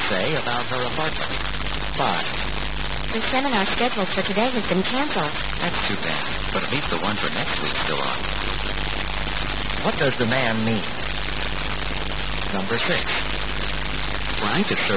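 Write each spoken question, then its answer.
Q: What does the man mean?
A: He's glad next week's seminar is still on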